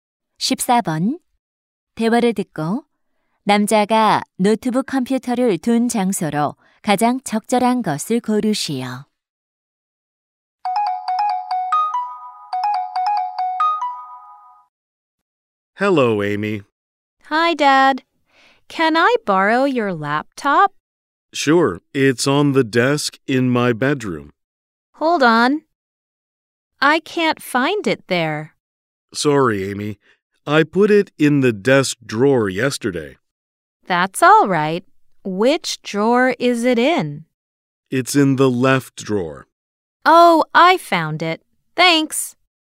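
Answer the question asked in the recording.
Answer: 책상 왼쪽 서랍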